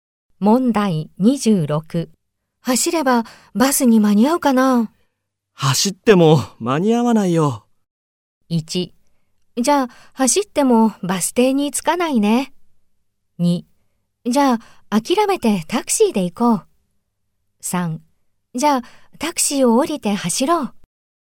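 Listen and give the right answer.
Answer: 2: じゃあ、諦めてタクシーで行こう。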